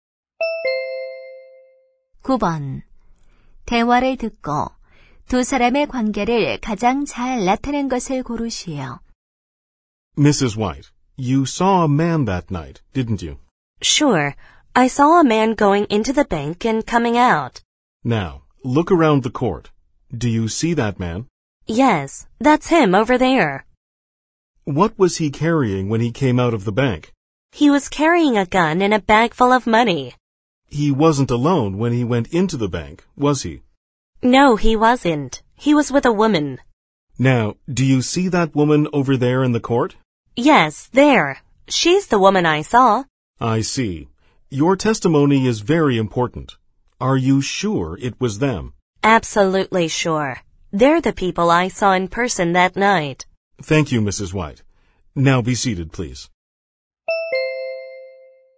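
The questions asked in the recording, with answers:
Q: 대화를 듣고 두 사람의 관계를 가장 잘 나타낸 것을 고르시오.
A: 변호사(검사)와 증인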